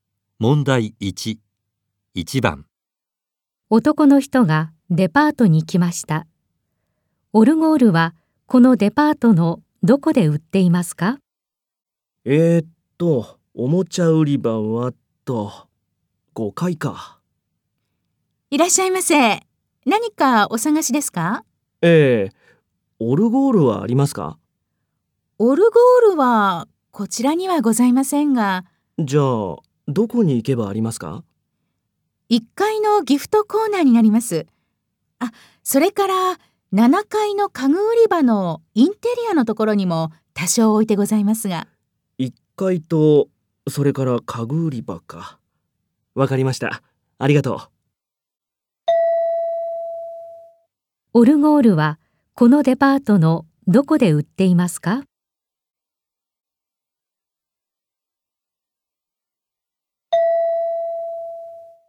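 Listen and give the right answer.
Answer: 1階のギフトコーナーと7階の家具売り場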